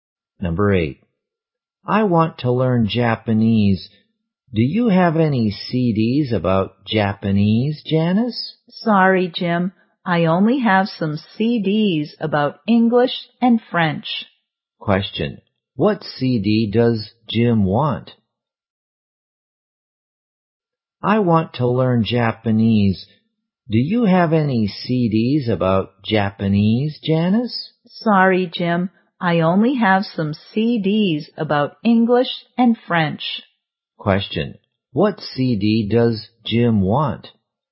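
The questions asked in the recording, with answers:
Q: What CD does Jim want?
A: A CD about Japanese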